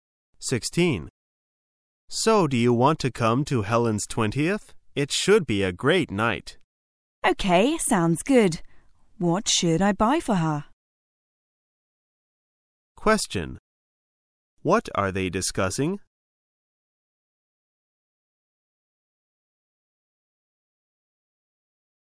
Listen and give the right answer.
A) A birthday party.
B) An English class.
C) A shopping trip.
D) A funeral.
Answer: A) A birthday party.

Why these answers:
此题考查从内容推测的能力。解题的关键在于听到Helen's 20th与What should I buy for her?